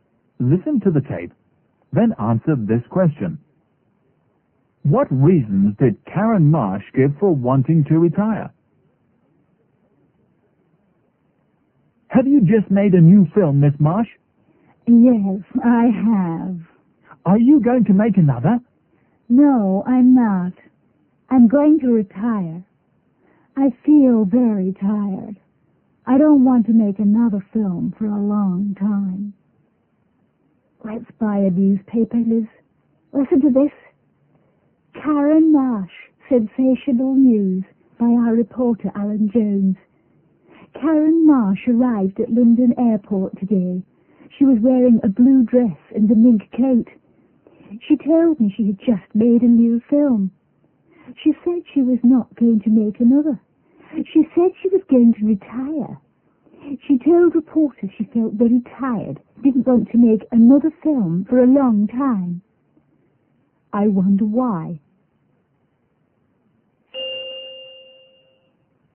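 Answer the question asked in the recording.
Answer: She felt very tired and didn't want to make another film for a long time.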